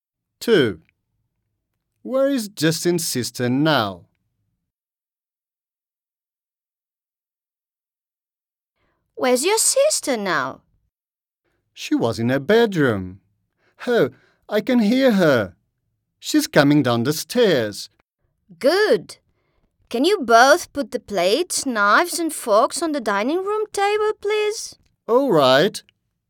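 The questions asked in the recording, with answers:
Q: Where is Justin's sister now?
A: on the stairs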